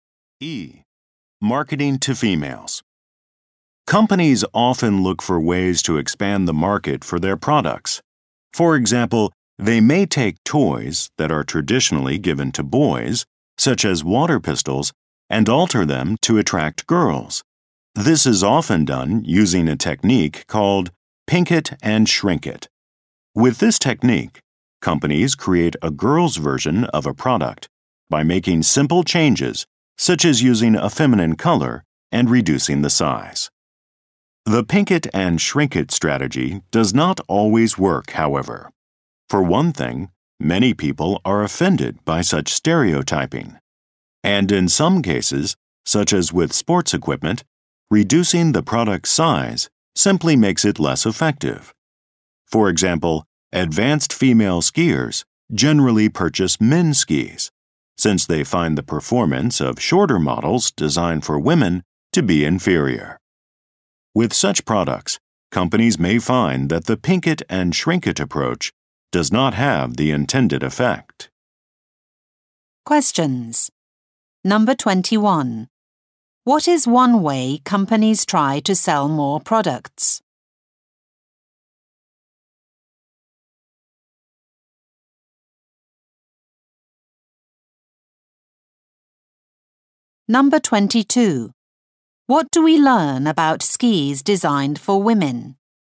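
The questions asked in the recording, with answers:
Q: What is one way companies try to sell more products?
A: Altering boys' products to attract girls

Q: What do we learn about skis designed for women?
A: Their performance is inferior because they are shorter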